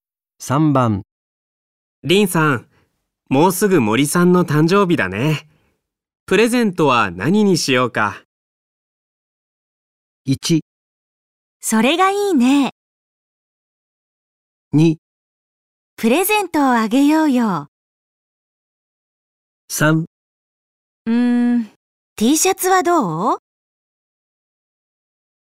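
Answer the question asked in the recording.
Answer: 3: T シャツはどう?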